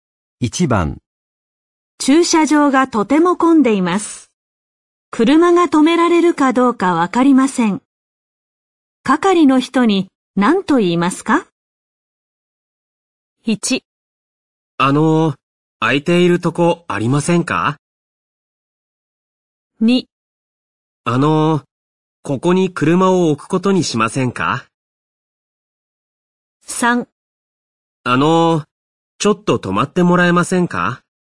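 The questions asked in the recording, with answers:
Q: 係の人に何と言いますか?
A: 1: 空いているとこありませんか?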